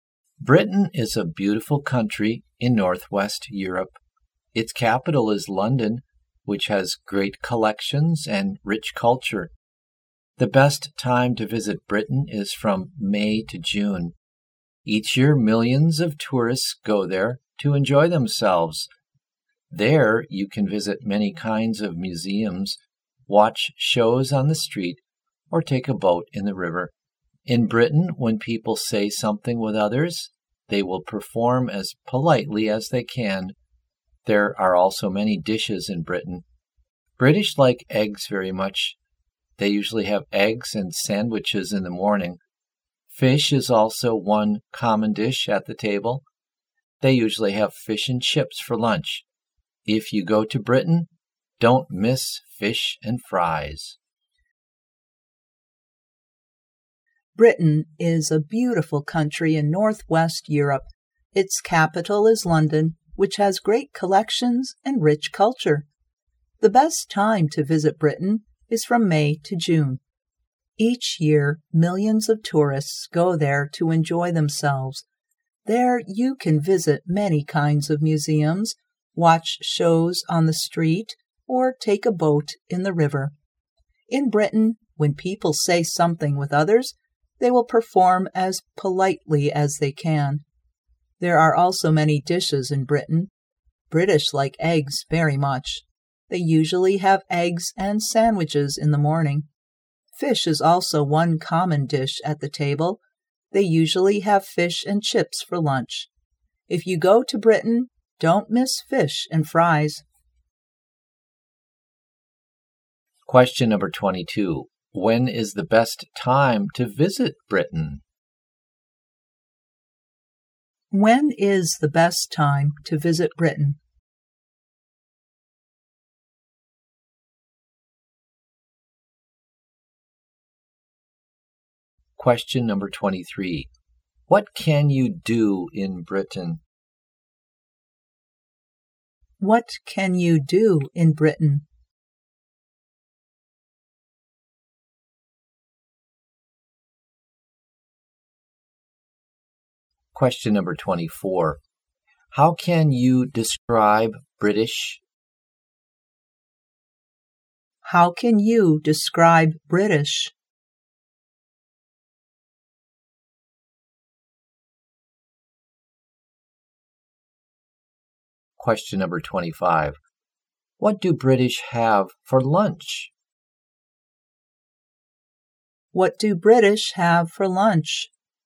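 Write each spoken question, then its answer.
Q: When is the best time to visit Britain?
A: From May to June

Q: How can you describe British?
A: Polite

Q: What do British have for lunch?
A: Fish and chips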